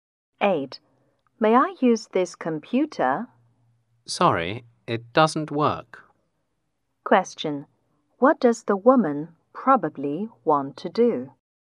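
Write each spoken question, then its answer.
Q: What does the woman probably want to do?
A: Use the computer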